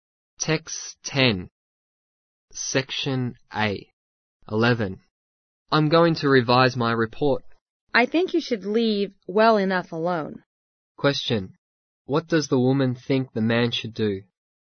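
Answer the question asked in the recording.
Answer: Leave his report as it is and not revise it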